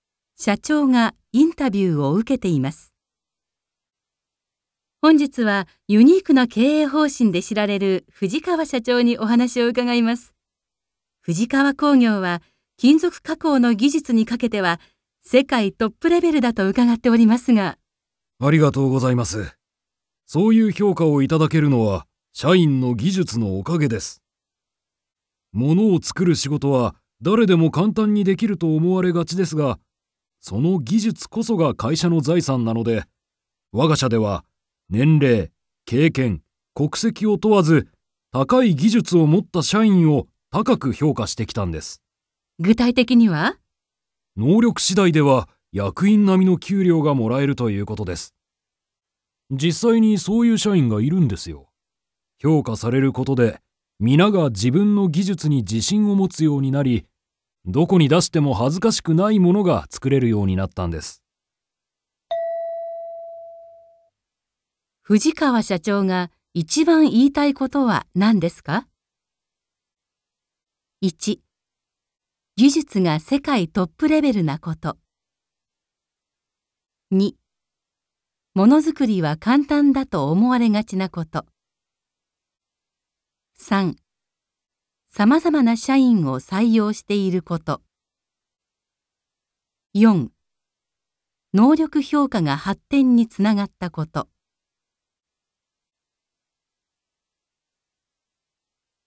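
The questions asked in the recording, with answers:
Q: 藤川社長が一番言いたいことは何ですか?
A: 4: 能力評価が発展につながったこと。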